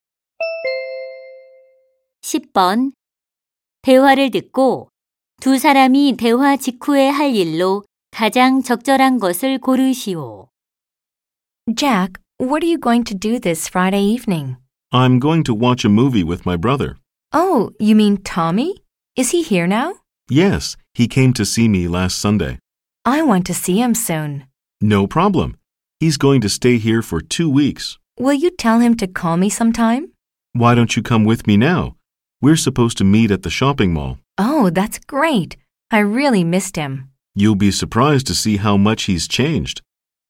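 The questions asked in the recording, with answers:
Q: 대화를 듣고 두 사람이 대화 직후에 할 일로 가장 적절한 것을 고르시오.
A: 쇼핑몰에 가서 Tommy 만나기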